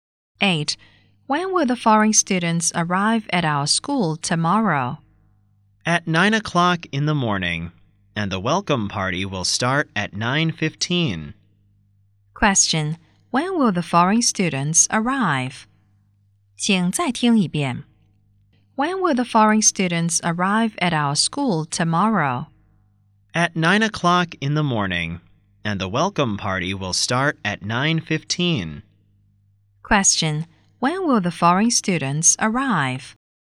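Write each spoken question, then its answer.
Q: when will the foreign students arrive?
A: At 9 o'clock in the morning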